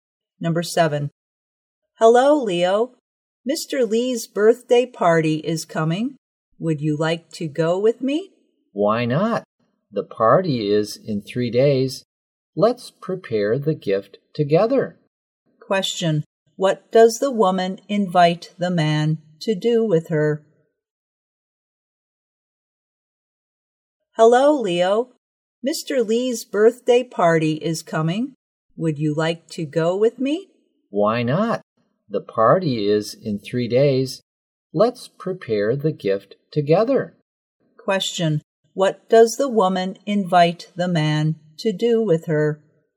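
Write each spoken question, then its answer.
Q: Question. What does the woman invite the man to do with her?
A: Go to Mr. Lee's birthday party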